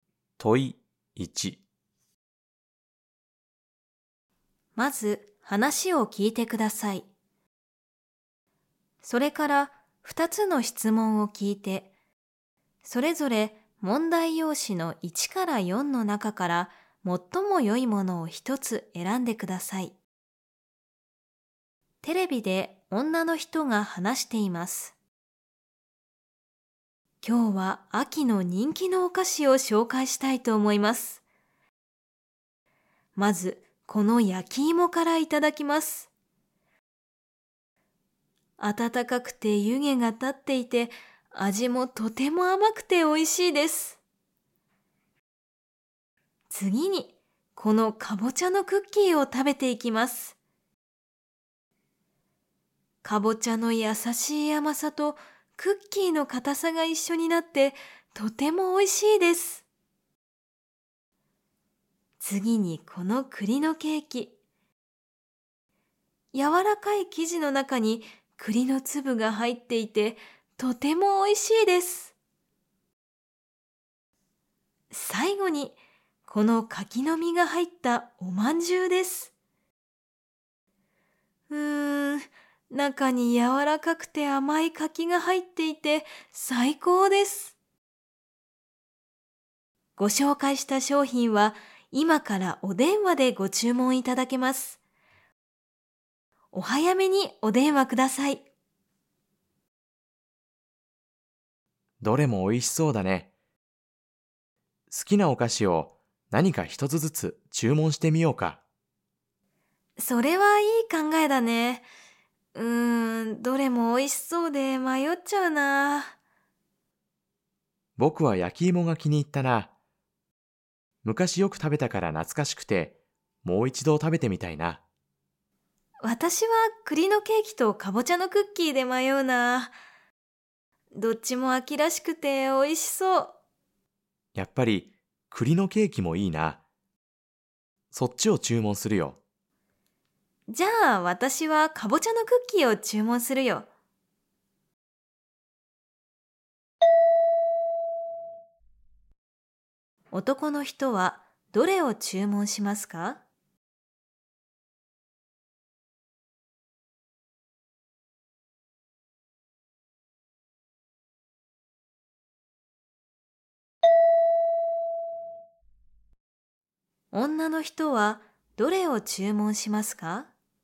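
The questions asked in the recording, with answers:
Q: 男の人はどれを注文しますか?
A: 栗のケーキ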